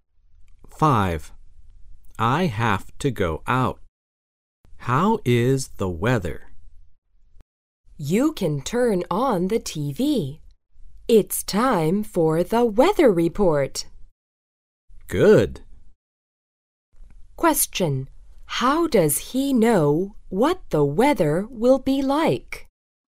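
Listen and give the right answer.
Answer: From the weather report on TV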